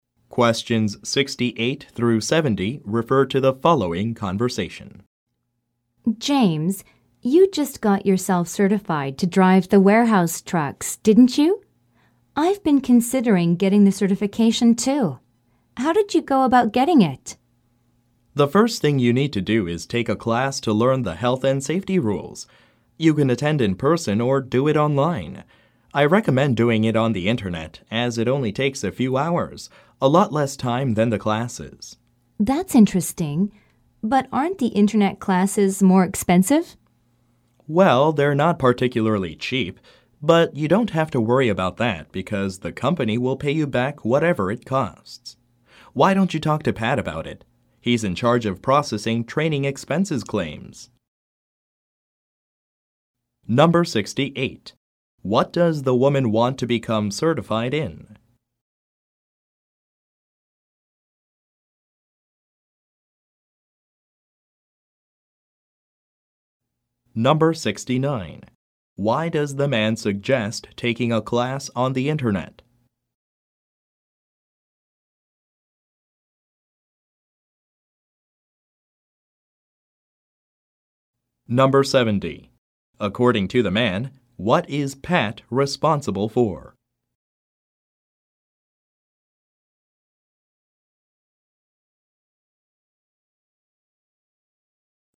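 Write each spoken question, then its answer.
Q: What does the woman want to become certified in?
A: Driving the warehouse trucks

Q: Why does the man suggest taking a class on the internet?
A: It takes less time than the in-person classes

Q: According to the man, what is Pat responsible for?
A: Processing training expense claims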